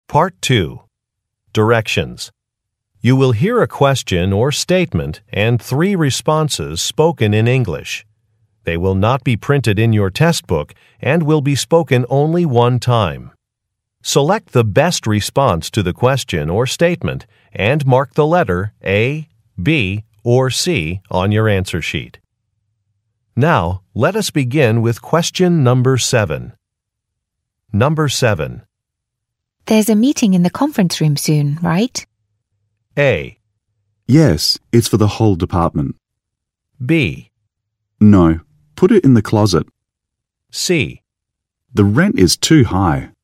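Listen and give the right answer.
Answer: Yes, it's for the whole department.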